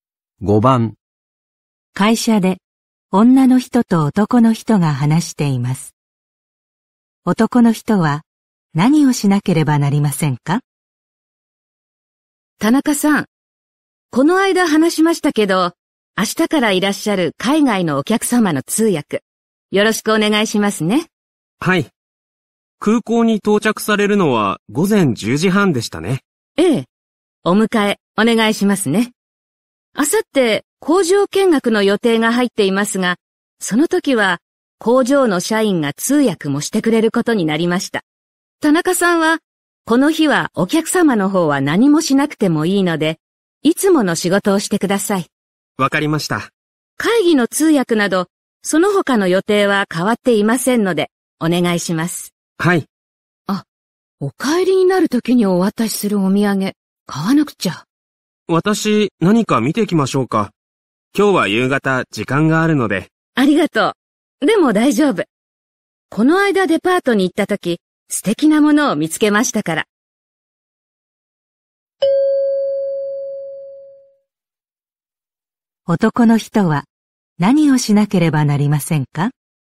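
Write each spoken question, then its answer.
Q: 男の人は何をしなければなりませんか?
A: 明日、空港にお客様を迎えに行く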